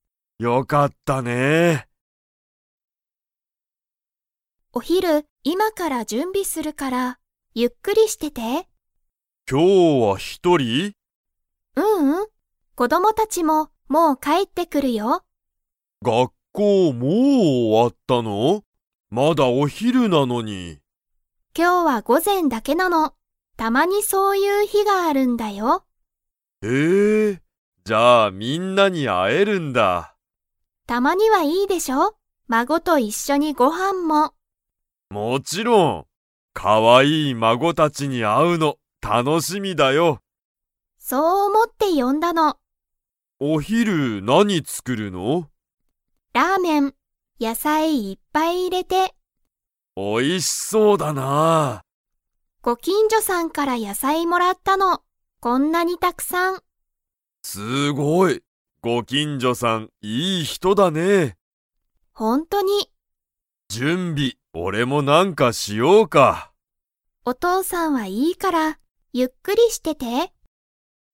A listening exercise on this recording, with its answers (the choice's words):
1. ミサのお父とうさんは、今日きょう子供こどもたちに 。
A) 会あえる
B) 会あえない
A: 会あえる

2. ミサは、ご近所きんじょさんから何なにをもらいましたか?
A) 本ほん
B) お肉にく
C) ラーメン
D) 野菜やさい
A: 野菜やさい

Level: Level 4